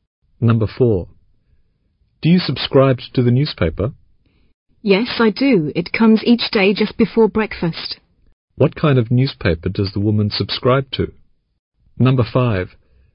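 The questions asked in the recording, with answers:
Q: What kind of newspaper does the woman subscribe to?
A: A daily morning newspaper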